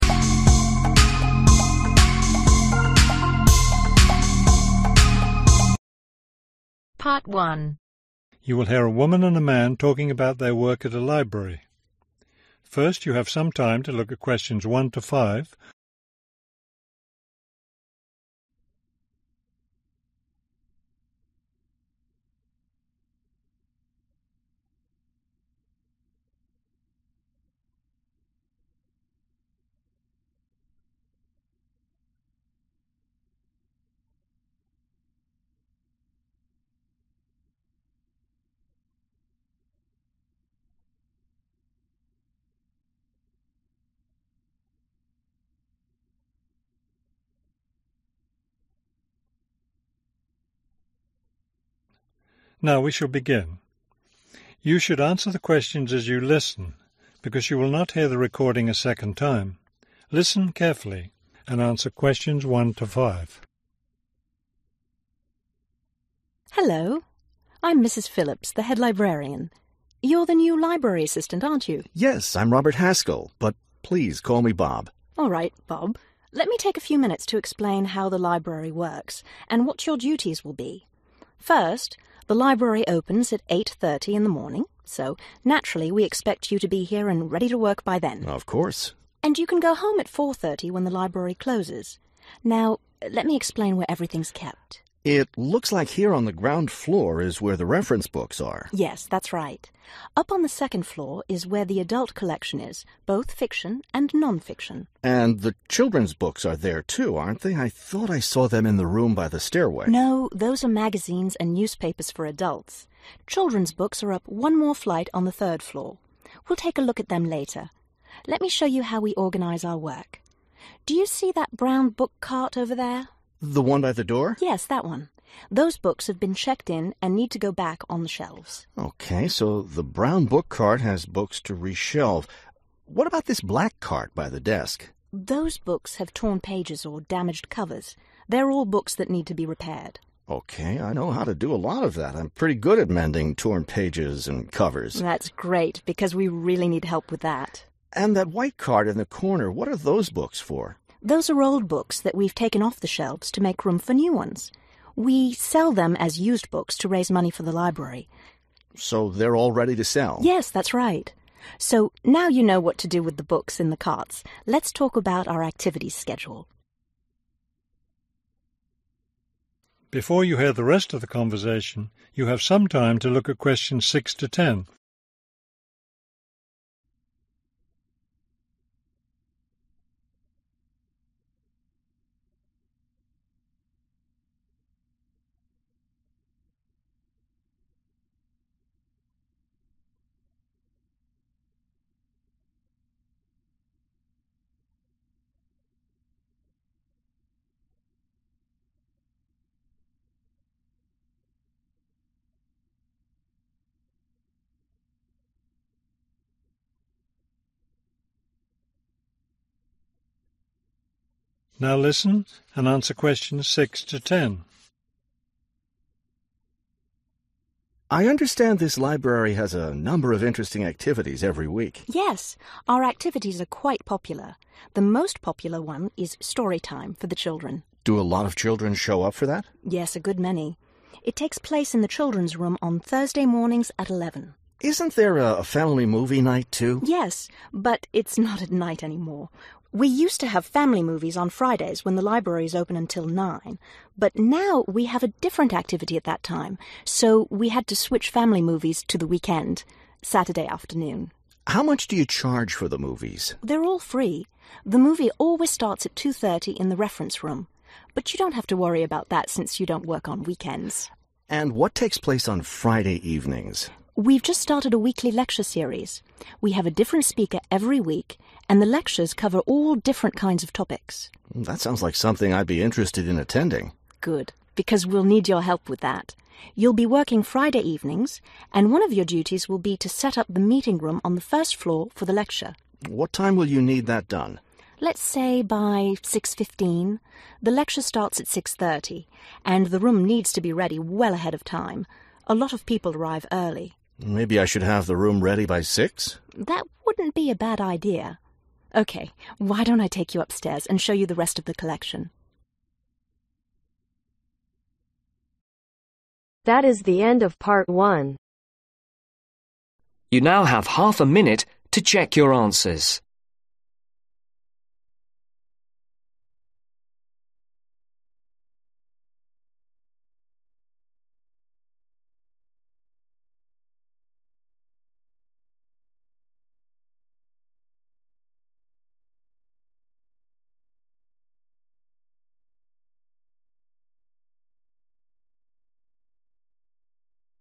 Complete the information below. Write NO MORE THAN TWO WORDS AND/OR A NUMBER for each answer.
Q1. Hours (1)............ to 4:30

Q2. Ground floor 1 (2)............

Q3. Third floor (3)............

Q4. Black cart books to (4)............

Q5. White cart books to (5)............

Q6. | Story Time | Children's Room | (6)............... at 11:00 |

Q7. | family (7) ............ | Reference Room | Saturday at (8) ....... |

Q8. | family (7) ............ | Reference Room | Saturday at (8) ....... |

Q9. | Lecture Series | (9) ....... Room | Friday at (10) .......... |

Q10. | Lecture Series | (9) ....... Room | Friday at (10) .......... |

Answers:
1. 8:30
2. Reference books
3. Children's books
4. Be repaired/repair
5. Be sold/Sell
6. Thursday
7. Movies
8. 2:30
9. Meeting
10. 6:30